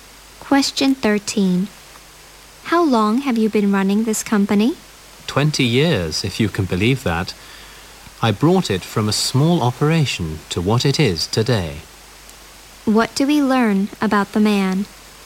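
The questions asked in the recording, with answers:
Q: What do we learn about the man?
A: He has run the company for 20 years and built it up from a small operation.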